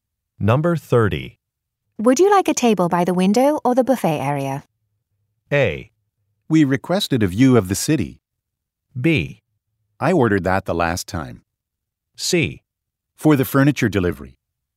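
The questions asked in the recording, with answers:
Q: Would you like a table by the window or the buffet area?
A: A: We requested a view of the city.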